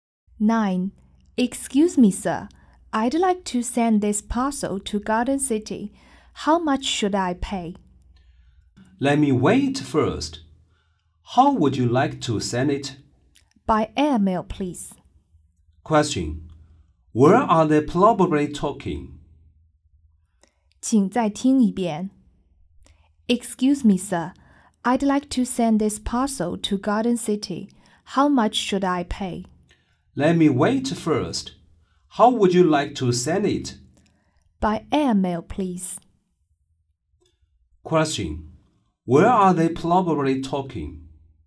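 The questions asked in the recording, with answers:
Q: Question. Where are they probably talking?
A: At a post office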